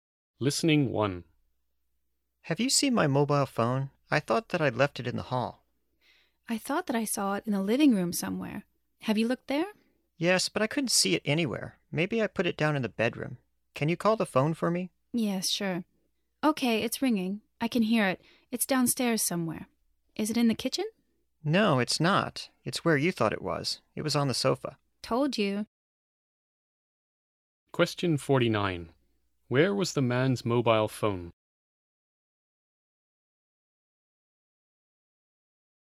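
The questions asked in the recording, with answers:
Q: Where was the man's mobile phone?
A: On the sofa in the living room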